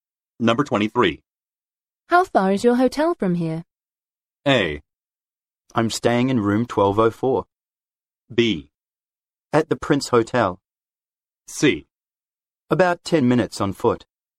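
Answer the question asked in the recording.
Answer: C: About 10 minutes on foot.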